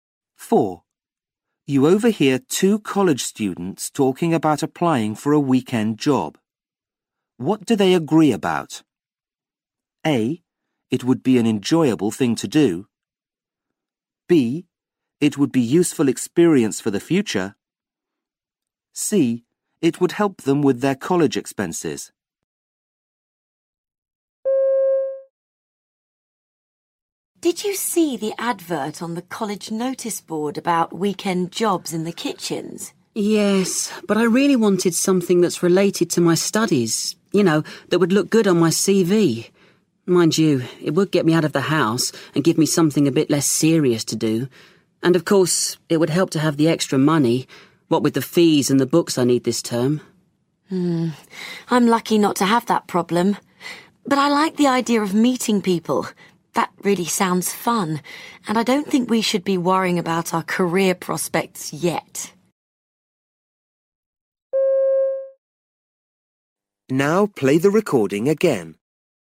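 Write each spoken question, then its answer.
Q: What do they agree about?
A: A: It would be an enjoyable thing to do.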